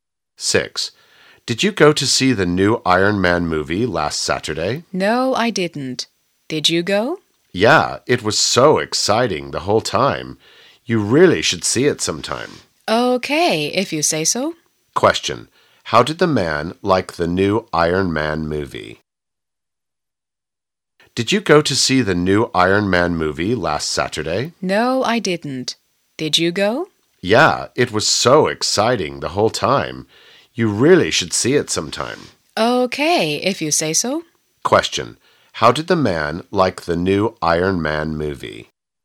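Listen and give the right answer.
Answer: Very exciting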